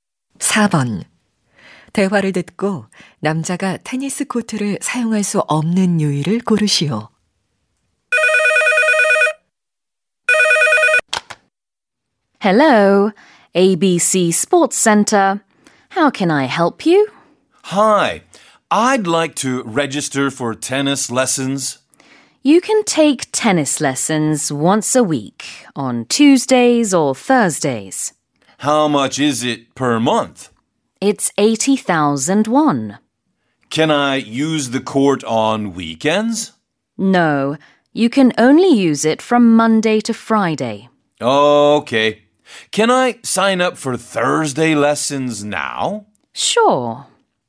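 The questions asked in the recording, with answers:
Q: 대화를 듣고 남자가 테니스 코트를 사용할 수 없는 이유를 고르시오.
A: 주말에는 코트를 사용할 수 없어서 (월~금만 사용 가능)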